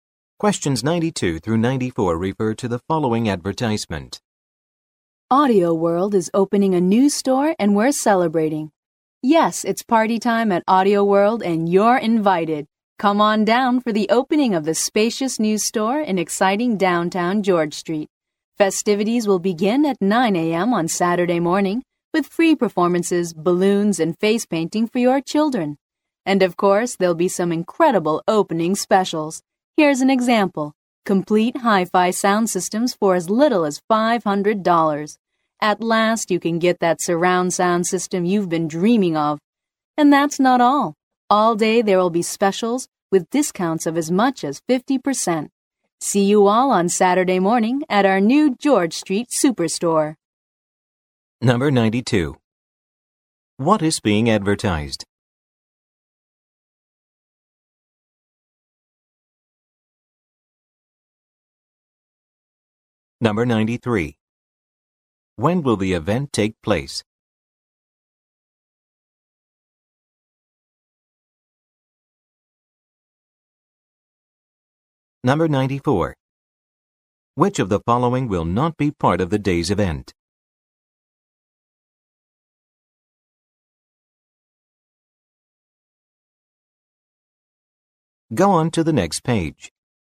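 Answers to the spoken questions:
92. The opening of a new Audio World store
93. Saturday morning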